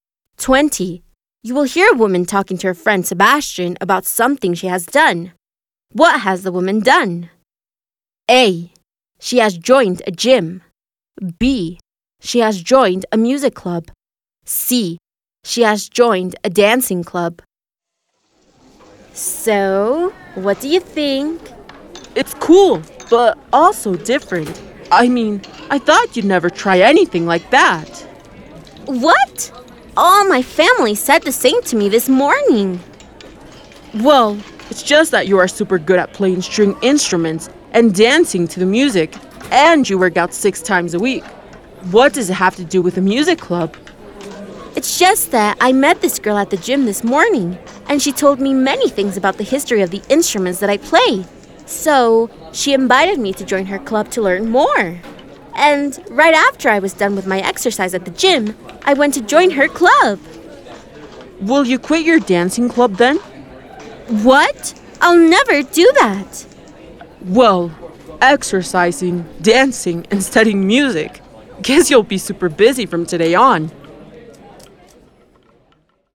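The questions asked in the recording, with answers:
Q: What has the woman done? A.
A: B: She has joined a music club.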